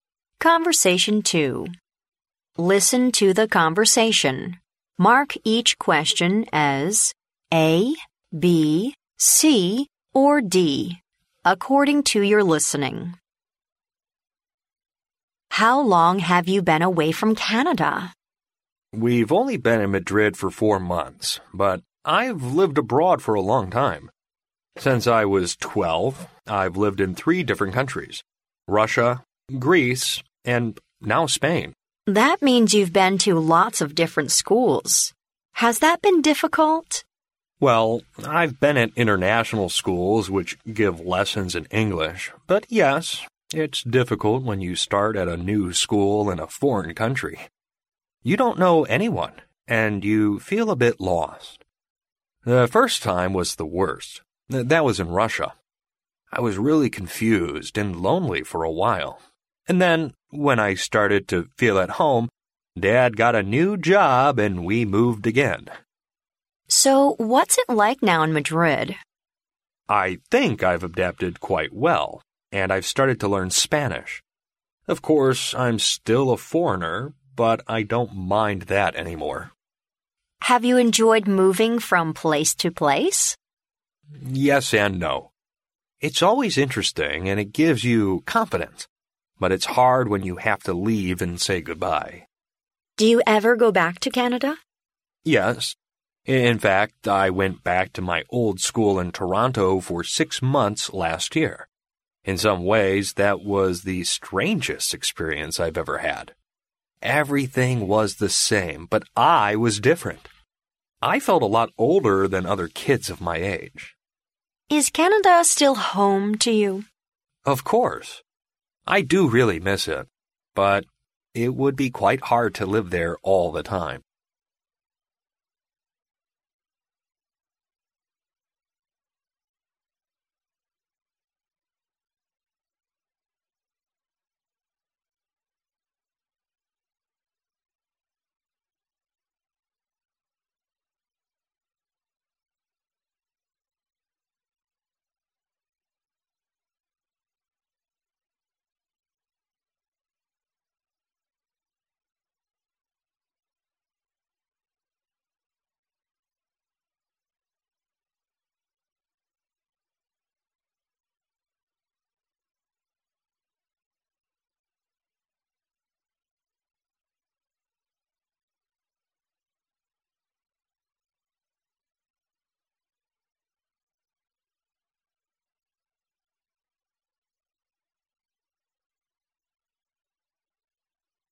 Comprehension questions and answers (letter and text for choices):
Listen to the conversation, mark each question as A, B, C or D according to your listening.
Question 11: When did the man leave Canada?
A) At the age of three.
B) When he was twelve.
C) Four months ago.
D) Twelve years ago.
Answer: B) When he was twelve.

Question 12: How many foreign countries has the man lived in?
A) 3.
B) 4.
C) 6.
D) 12.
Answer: A) 3.

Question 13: Where is the man living now?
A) In Canada.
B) In Russia.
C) In Greece.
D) In Spain.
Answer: D) In Spain.

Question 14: How did the man feel when he first got to a new place?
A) Confused and lonely.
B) Excited and nervous.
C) Scared and uneasy.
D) Happy but anxious.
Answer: A) Confused and lonely.

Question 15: Why does the man like to move from place to place?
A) He can learn foreign languages easily.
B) He can make many new friends.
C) It is interesting and it makes him confident.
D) It enables him to see beautiful sights.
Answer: C) It is interesting and it makes him confident.

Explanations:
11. 录音开篇男士在回答女士有关他离开加拿大多久的问题时,提到"Since I was twelve I've lived in three different countries...",由此可推测,男士在12岁便已离开加拿大在其他国家生活。故选B项。
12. 录音中男士提到"I've lived in three different countries: Russia, Greece and now Spain.",由此可知男士总共在3个外国国家生活过。故选A项。
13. 录音中男士说"I've lived in three different countries: Russia, Greece and now Spain",可知男士现在正生活在西班牙。故选D项。
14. 在回答女士关于换学校的问题时,男士提及"The first time was the worst...I was really confused and lonely for a while",由此可知男士在第一次去往新国家和新学校时,感到十分困惑和孤独。故选A项。
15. 在女士问及男士是否喜欢到处搬家的生活时,男士认为这种生活有喜有悲,而让他愉快的原因则是"It's always interesting and it gives you confidence",故选C项。

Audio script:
W: How long have you been away from Canada?
M: We've only been in Madrid for four months, but I've lived abroad for a long time. Since I was twelve I've lived in three different countries: Russia, Greece and now Spain.
W: That means you've been to lots of different schools. Has that been difficult?
M: Well, I've been at international schools which give lessons in English. But yes, it's difficult when you start at a new school in a foreign country. You don't know anyone and you feel a bit lost. The first time was the worst—that was in Russia. I was really confused and lonely for a while. And then, when I started to feel at home, Dad got a new job and we moved again!
W: So what's it like now in Madrid?
M: I think I've adapted quite well and I've started to learn Spanish. Of course I'm still a foreigner, but I don't mind that any more.
W: Have you enjoyed moving from place to place?
M: Yes and no. It's always interesting and it gives you confidence. But it's hard when you have to leave and say goodbye.
W: Do you ever go back to Canada?
M: Yes. In fact I went back to my old school in Toronto for six months last year. In some ways that was the strangest experience I've ever had. Everything was the same, but I was different! I felt a lot older than other kids of my age.
W: Is Canada still "home" to you?
M: Of course. I do really miss it, but it would be quite hard to live there all the time.